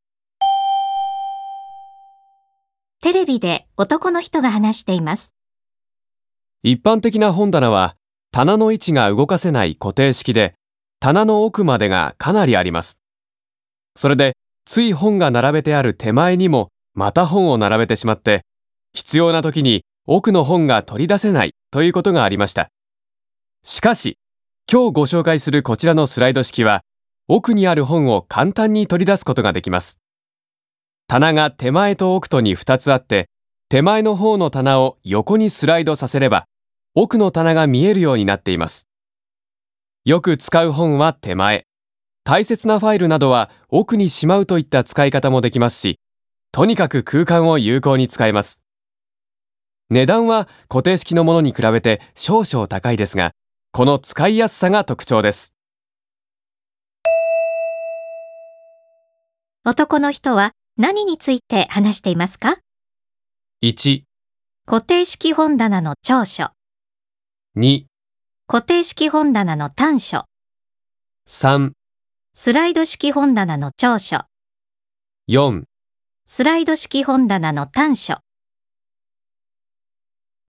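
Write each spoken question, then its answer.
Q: 男の人は何について話していますか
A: 3: スライド式本棚の長所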